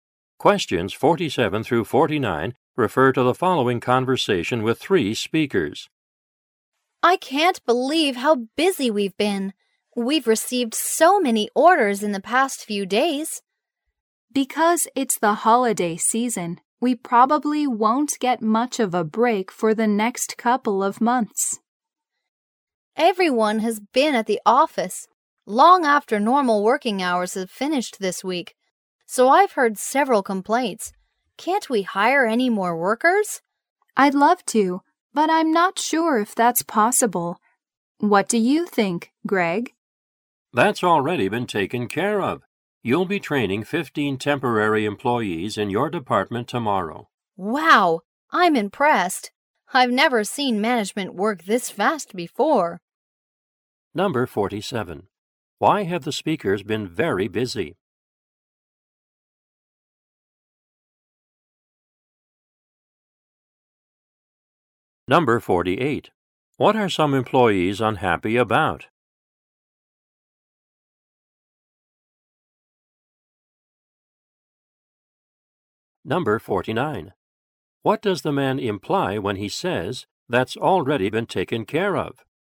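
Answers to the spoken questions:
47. Many holiday season orders
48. Working long after normal hours
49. Temporary workers have already been hired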